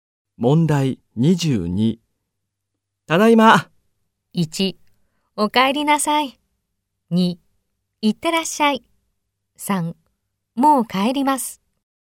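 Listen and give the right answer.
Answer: 1: お帰りなさい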